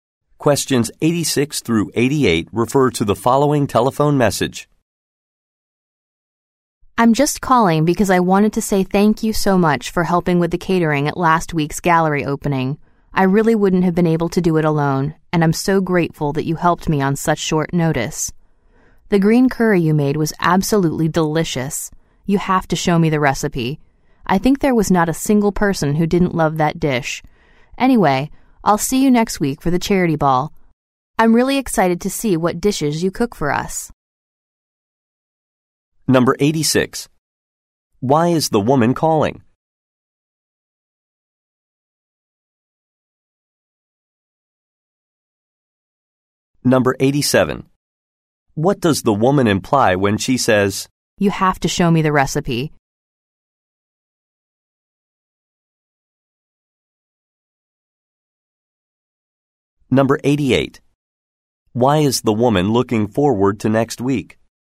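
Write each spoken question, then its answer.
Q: Why is the woman calling?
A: To thank someone for helping with catering at a gallery opening

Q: What does the woman imply when she says,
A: She wants to learn to make the green curry

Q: Why is the woman looking forward to next week?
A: To see what dishes will be cooked at the charity ball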